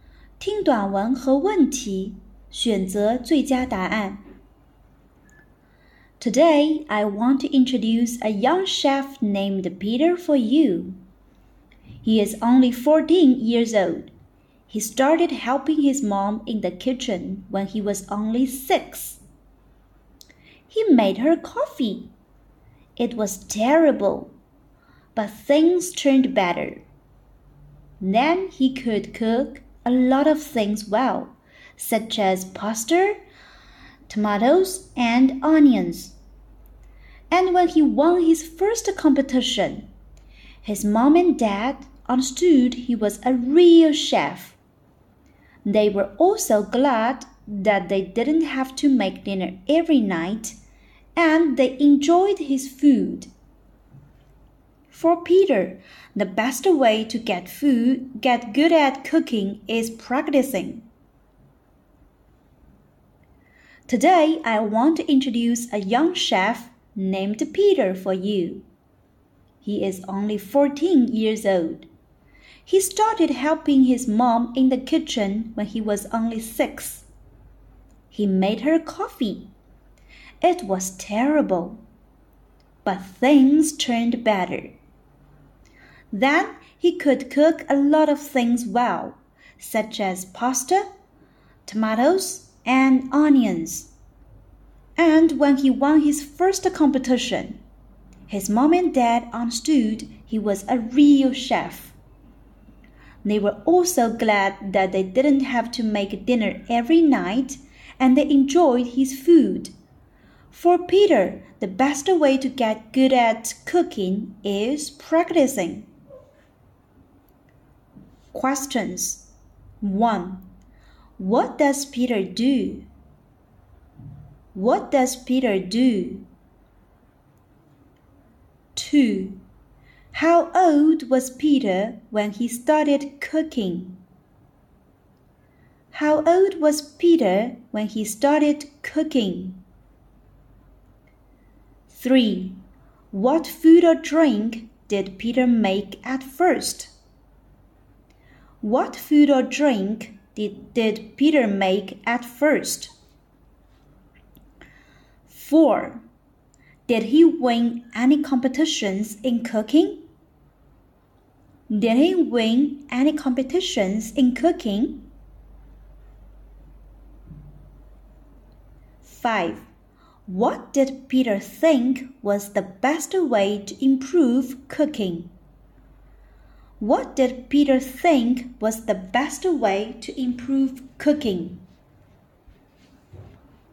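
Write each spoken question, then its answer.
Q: What does Peter do?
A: He is a chef.

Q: What food or drink did Peter make at first?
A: Coffee

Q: Did he win any competitions in cooking?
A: Yes, he did.

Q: What did Peter think was the best way to improve cooking?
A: Practicing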